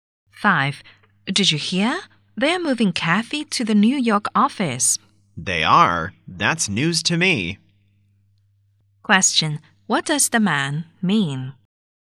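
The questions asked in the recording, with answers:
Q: What does the man mean?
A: He hadn't heard the news and is surprised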